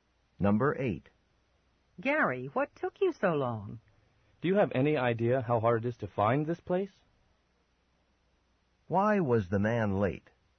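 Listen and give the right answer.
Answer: The place was hard to find.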